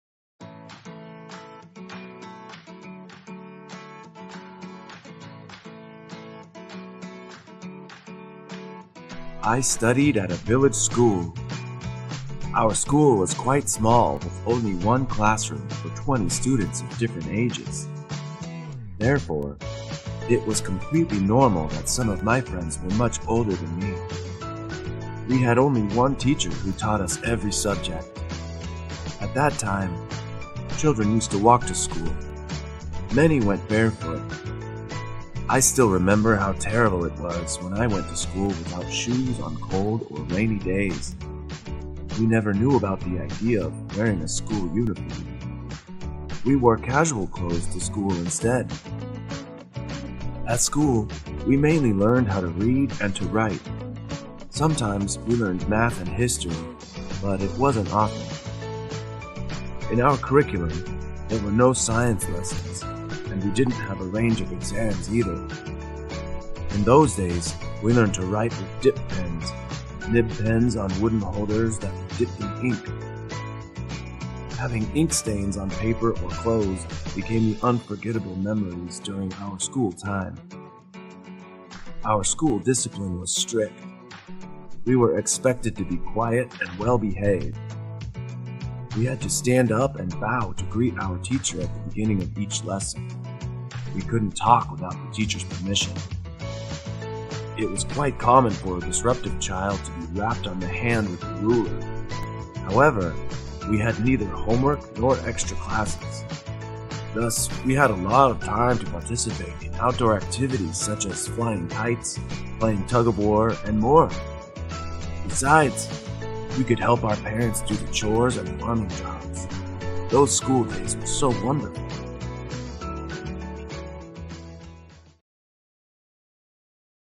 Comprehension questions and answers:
Task: Fill in the blanks with one or two words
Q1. The school had only ________ classroom.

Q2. Students learned to write with ________ pens.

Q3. There were no ________ lessons in the curriculum.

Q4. Discipline at school was very ________.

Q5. Students had ________ homework in those days.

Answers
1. one
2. dip
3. science
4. strict
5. no

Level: lớp 9